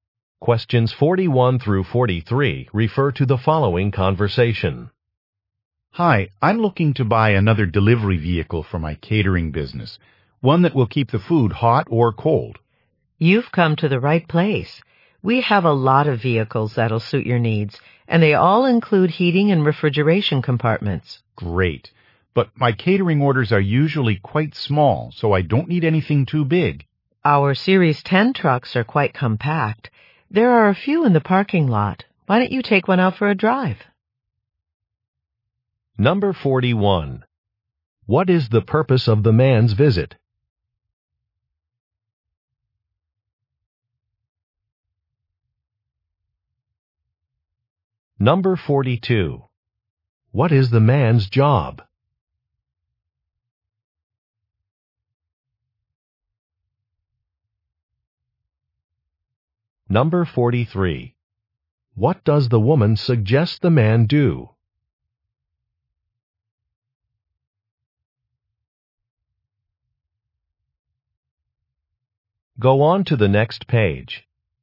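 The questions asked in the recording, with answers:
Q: What is the purpose of the man's visit?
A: To buy a delivery vehicle

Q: What is the man's job?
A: He runs a catering business

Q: What does the woman suggest the man do?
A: Test-drive a truck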